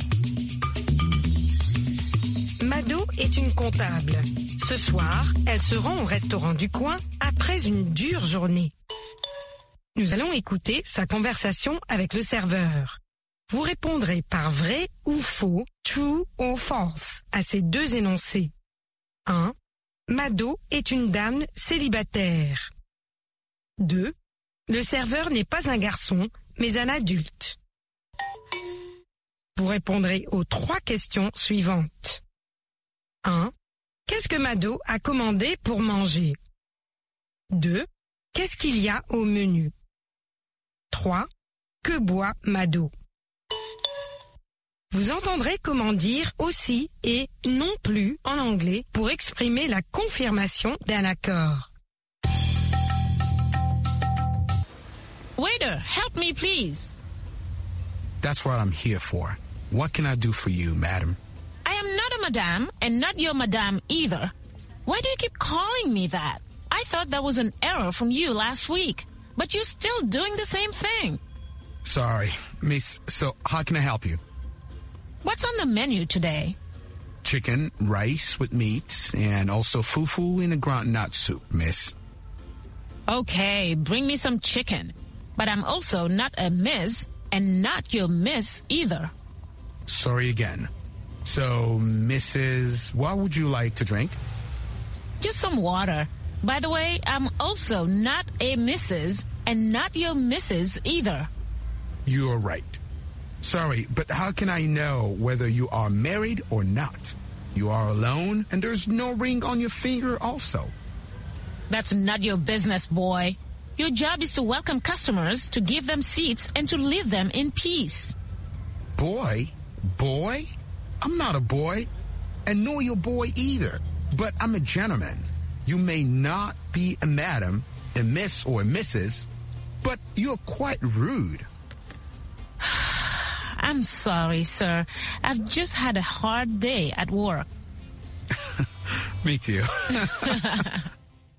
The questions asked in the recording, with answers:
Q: Le serveur n'est pas un garçon, mais un adulte.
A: L'énoncé 2 est vrai. Le serveur n'est pas un garçon, mais un adulte.

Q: Qu'est-ce que Mado a commandé pour manger?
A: Elle a commandé du poulet.

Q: Qu'est-ce qu'il y a au menu?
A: Du poulet, du riz, de la viande et du foufou.

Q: Que boit Mado?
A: De l'eau.